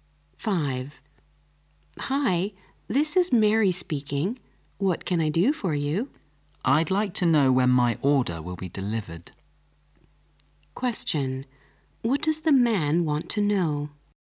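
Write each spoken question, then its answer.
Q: What does the man want to know?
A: When his order will be delivered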